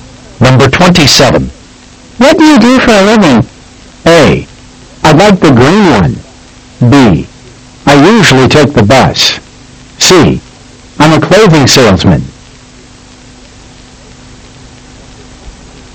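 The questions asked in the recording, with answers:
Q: What do you do for a living?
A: C: I'm a clothing salesman.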